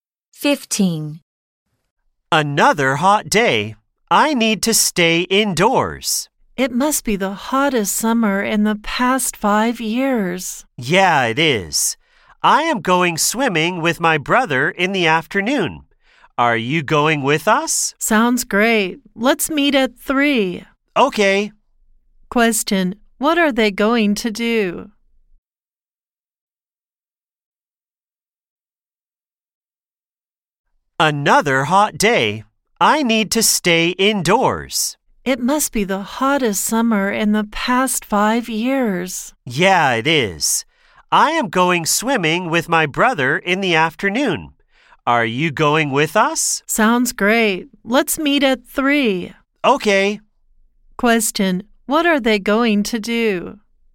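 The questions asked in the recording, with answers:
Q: What are they going to do?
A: Go swimming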